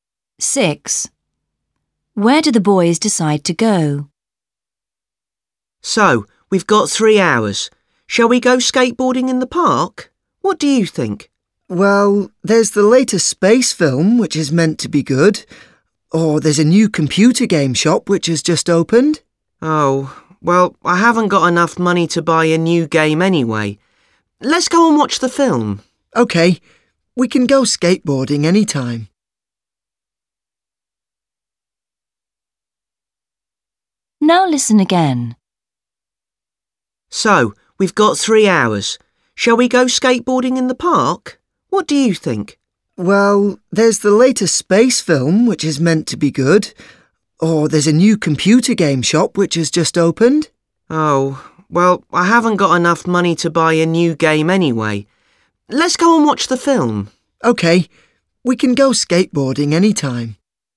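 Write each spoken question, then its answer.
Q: Where do the boys decide to go?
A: To the cinema to see the space film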